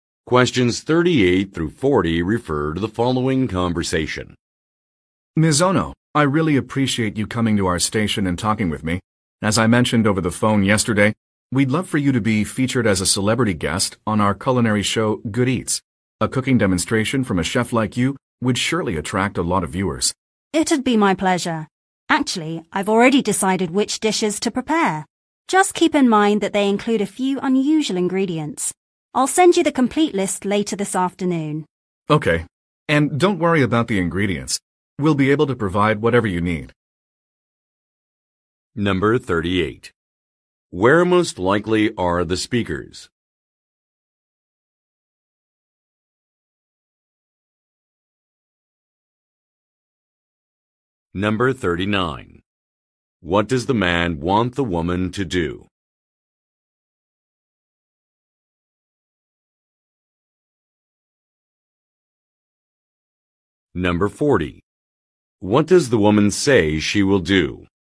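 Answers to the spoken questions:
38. At a television station
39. Appear as a celebrity guest on his cooking show
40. Send a complete list of ingredients later this afternoon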